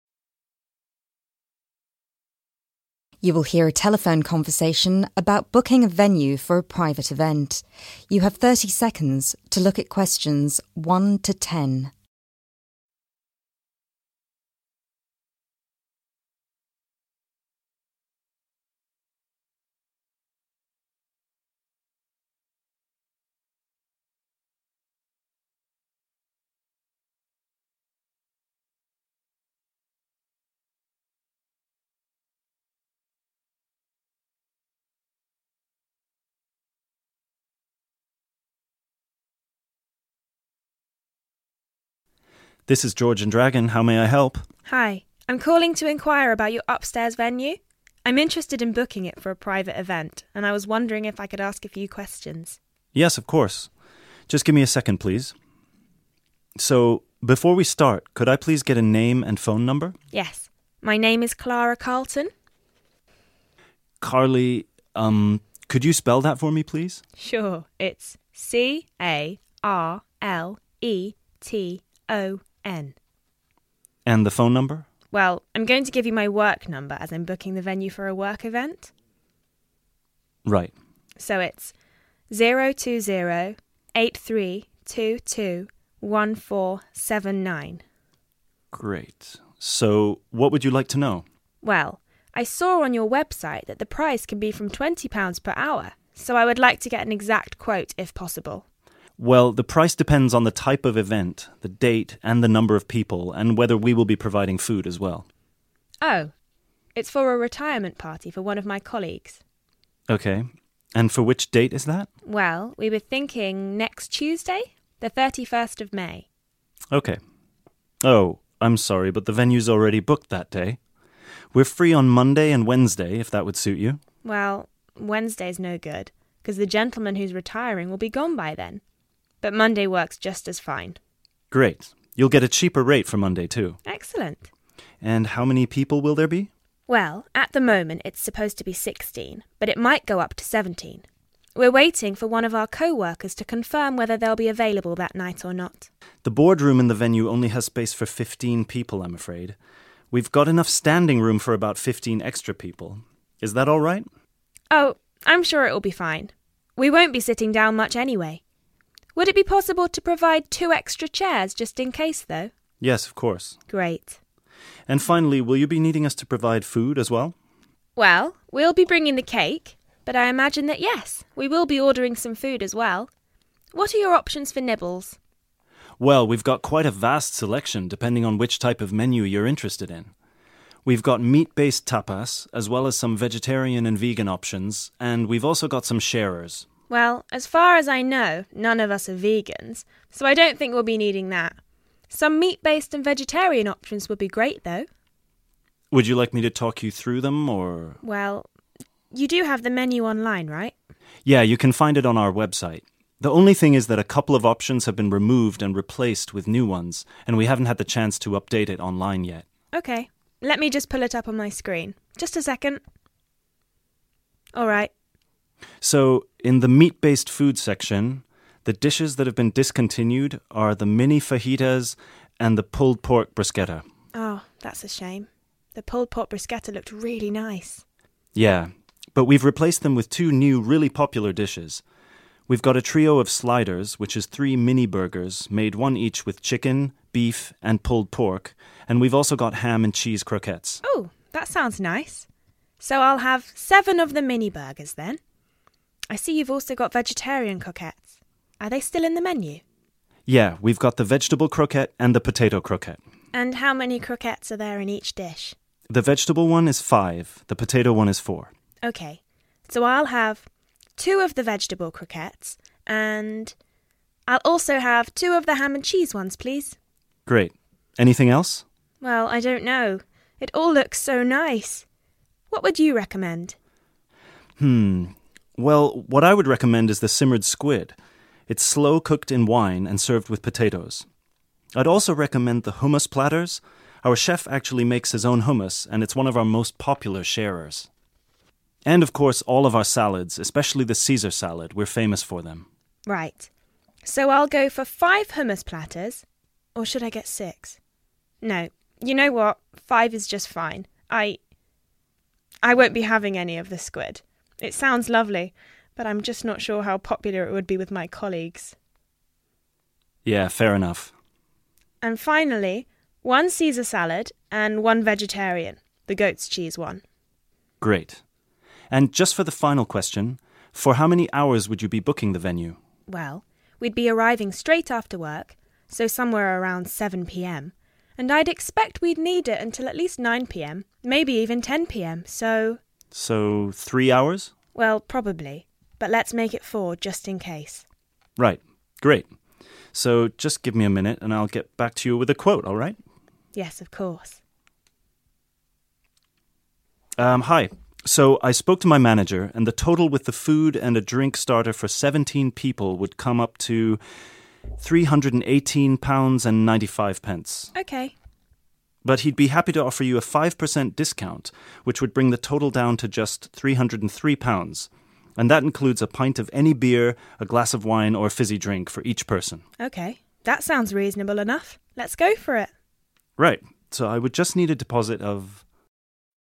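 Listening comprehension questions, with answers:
Complete the notes below. Write NO MORE THAN TWO WORDS AND/OR A NUMBER for each answer.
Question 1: Name: Carla 1...................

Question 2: Phone number: 2..................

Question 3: Date: 3.................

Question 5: Seven 5..............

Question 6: Two ham and cheese and two 6..............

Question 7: 7............... platters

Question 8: One Caesar and one 8................ salad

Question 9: Venue will be needed for a total of 9................ hours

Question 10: Final price: 10£..................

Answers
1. Carleton
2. 020 8322 1479
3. Monday 30th May
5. mini burgers
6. vegetable croquettes
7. 5 hummus
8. goat's cheese
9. 4
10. 303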